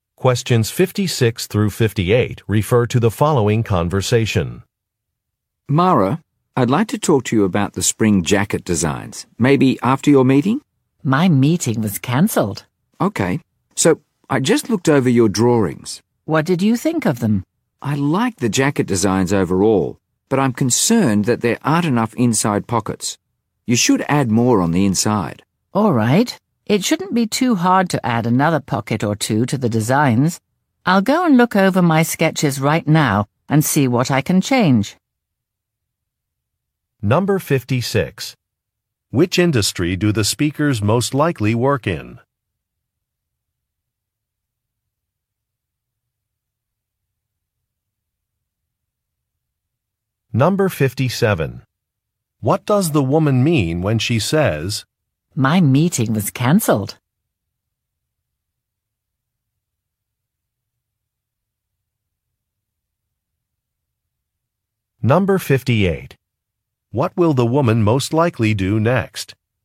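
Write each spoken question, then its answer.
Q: Which industry do the speakers most likely work in?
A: Fashion / clothing design

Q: What does the woman mean when she says, "My meeting was cancelled"?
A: She is available to talk now

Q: What will the woman most likely do next?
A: Review and revise her sketches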